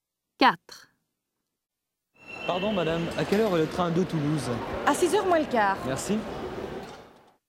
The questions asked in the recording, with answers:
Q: Pardon, madame, à quelle heure est le train de Toulouse?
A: 4, 5:45